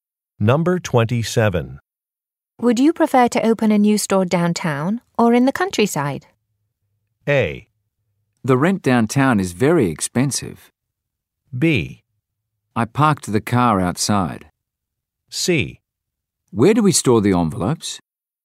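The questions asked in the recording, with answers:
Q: Would you prefer to open a new store downtown or in the countryside?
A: A: The rent downtown is very expensive.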